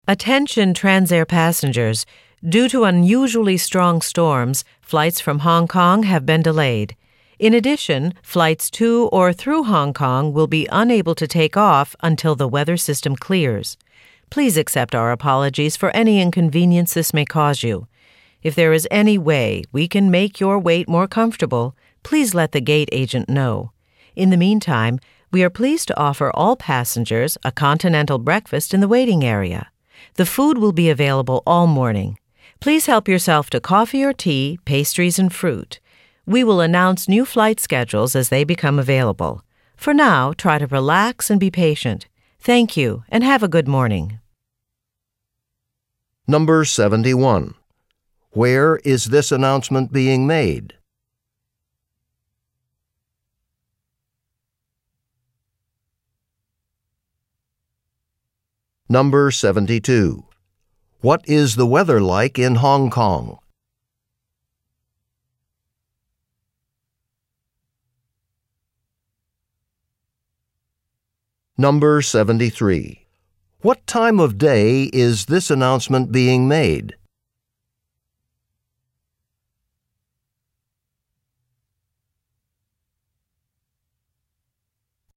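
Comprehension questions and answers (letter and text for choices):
Select the best response to each question and mark the letter (A), (B), (C), or (D) on your answer sheet.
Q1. Wher is the woman talking ?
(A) At a train statin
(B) At a travel agent's office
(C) at an airport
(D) at a coffee shop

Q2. What is the weather like in Hong Kong?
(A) It is foggy.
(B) It is clear.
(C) It is snowing lightly.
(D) It is stormy.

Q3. What time of day is this announcement being made?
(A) Morning.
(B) Afternoon.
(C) Evening.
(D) Late night.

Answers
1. (C) at an airport
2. (D) It is stormy.
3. (A) Morning.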